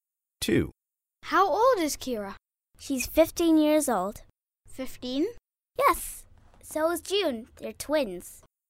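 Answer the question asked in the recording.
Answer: 15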